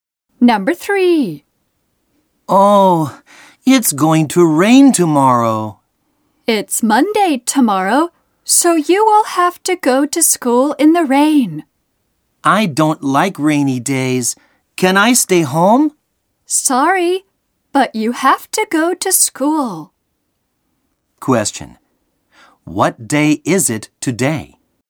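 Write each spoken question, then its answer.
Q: What day is it today?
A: Sunday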